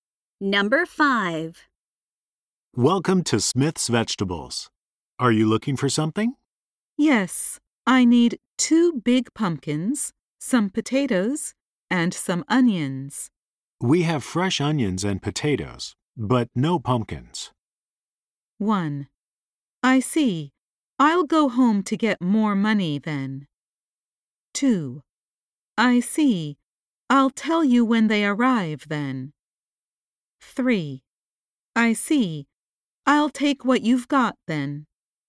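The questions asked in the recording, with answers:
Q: We have fresh onions and potatoes, but no pumpkins.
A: 3: I see. I'll take what you've got then.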